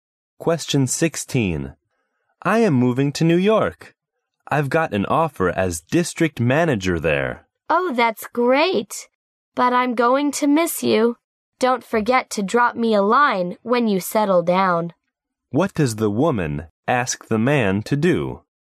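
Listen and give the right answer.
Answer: Write to her after he settles down.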